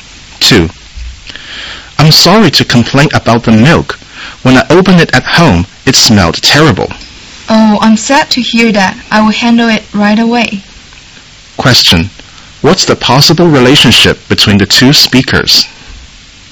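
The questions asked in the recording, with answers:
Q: What's the possible relationship between the two speakers?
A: Customer and shop assistant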